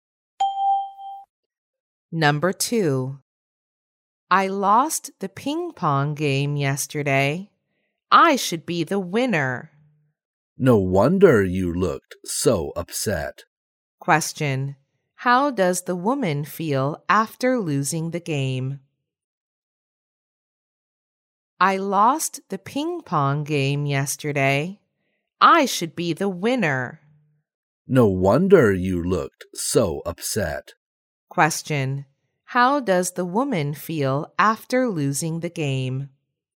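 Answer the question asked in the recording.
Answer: Upset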